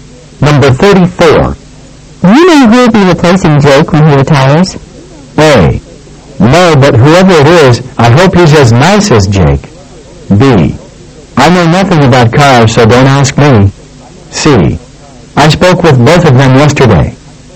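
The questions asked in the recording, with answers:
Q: Do you know who will be replacing Jake when he retires?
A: A: No, but whoever it is, I hope he's as nice as Jake.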